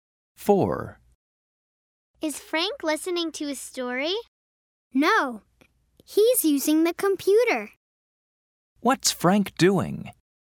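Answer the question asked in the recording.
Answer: He's using the computer.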